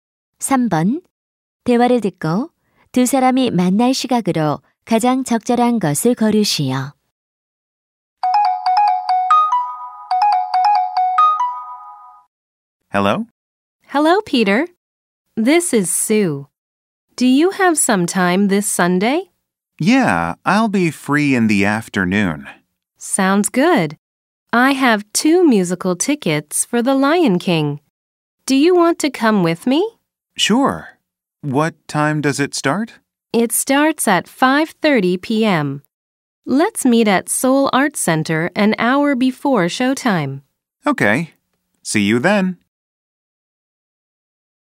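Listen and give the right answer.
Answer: 오후 4시 30분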